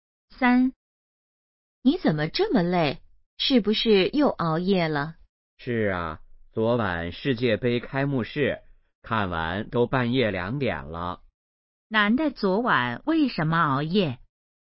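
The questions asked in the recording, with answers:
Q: 男的昨晚为什么熬夜?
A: 看世界杯开幕式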